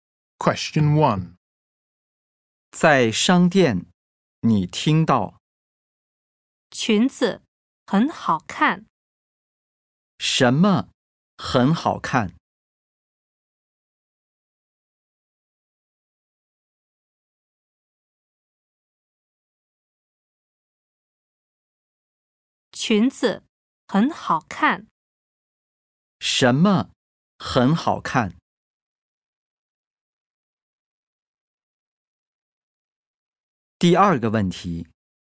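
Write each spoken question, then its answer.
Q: 什么很好看?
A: 裙子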